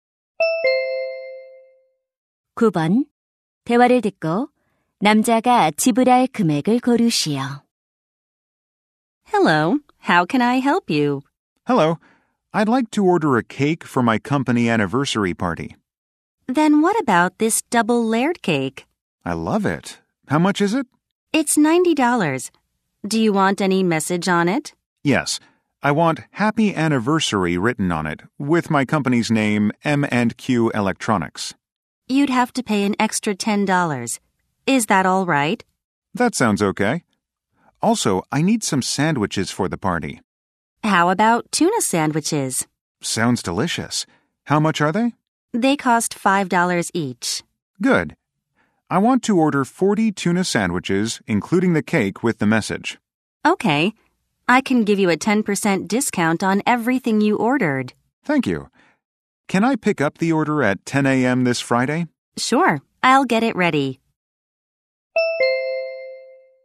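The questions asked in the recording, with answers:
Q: 대화를 듣고 남자가 지불할 금액을 고르시오.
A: $270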